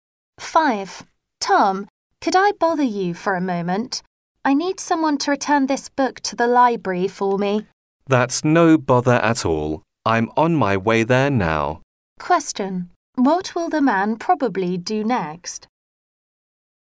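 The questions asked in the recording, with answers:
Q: What will the man probably do next?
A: Return the book to the library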